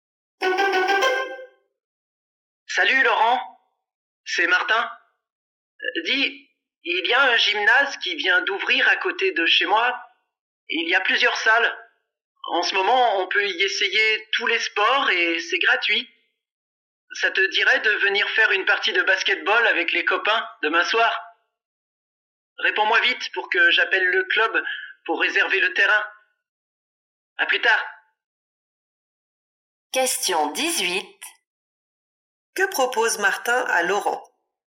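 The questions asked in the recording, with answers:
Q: Que propose Martin à Laurent?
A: Faire une partie de basket au nouveau gymnase demain soir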